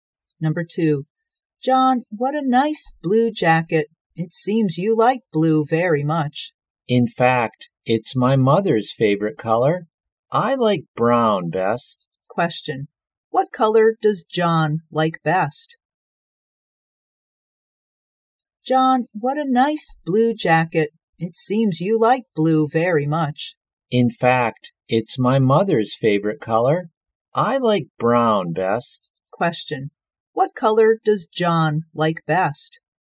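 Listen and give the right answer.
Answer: Brown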